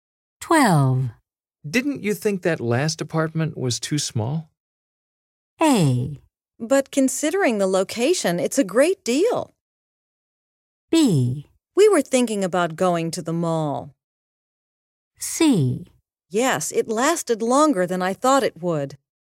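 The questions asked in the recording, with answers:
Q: Didn't you think that last apartment was too small?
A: A: But considering the location, it's a great deal.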